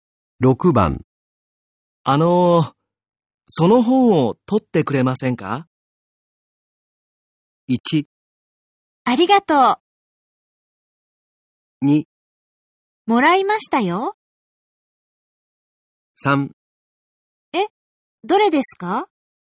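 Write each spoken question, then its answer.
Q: その本を取ってくれませんか?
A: 3: え、どれですか?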